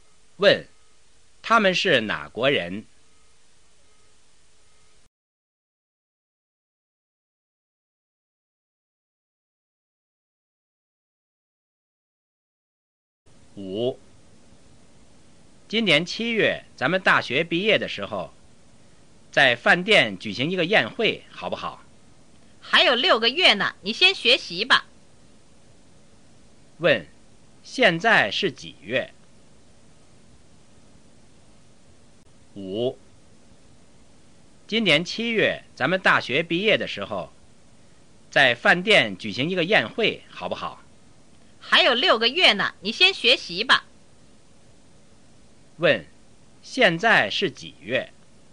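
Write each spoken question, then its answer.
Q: 现在是几月?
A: 一月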